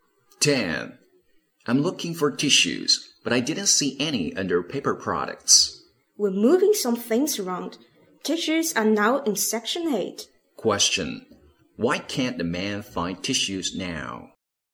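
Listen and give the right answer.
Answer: They have been moved to Section 8.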